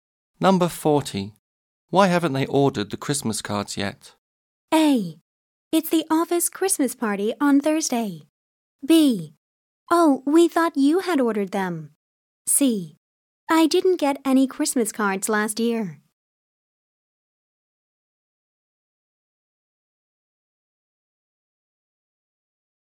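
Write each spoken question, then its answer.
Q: Why haven't they ordered the Christmas cards yet?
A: B: Oh, we thought you had ordered them.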